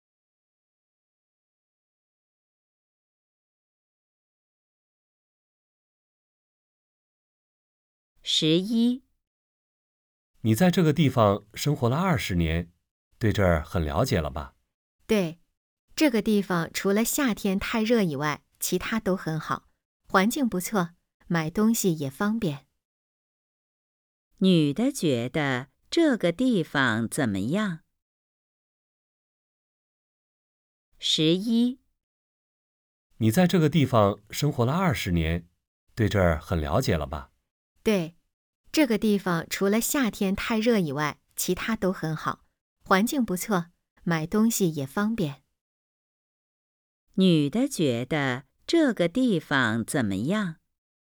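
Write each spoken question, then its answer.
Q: 女的觉得这个地方怎么样?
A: 除了夏天太热以外都很好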